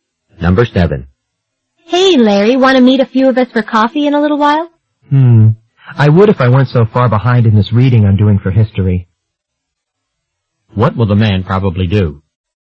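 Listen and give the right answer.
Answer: Keep doing his history reading instead of going for coffee.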